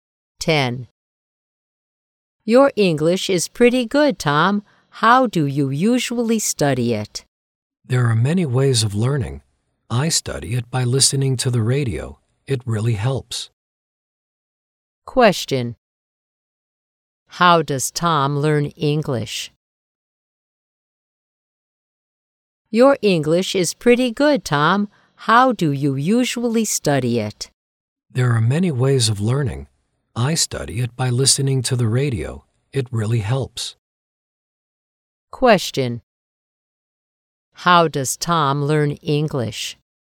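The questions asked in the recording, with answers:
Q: How does Tom learn English?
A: By listening to the radio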